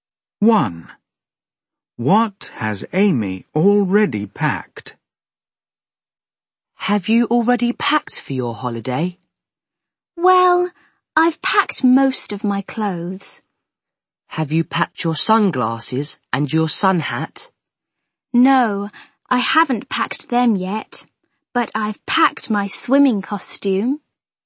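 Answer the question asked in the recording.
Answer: her swimming costume (and most of her clothes)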